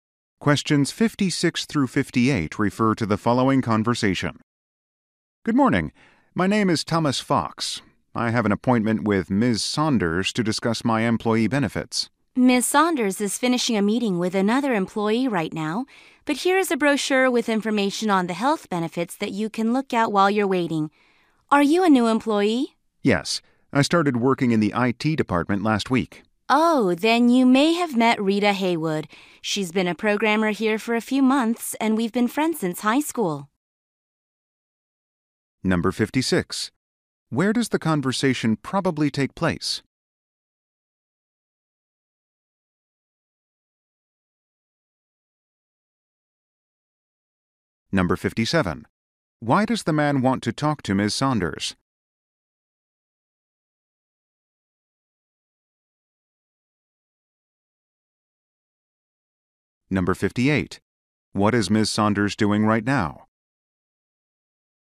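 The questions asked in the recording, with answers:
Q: Why does the man want to talk to Ms.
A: To discuss his employee benefits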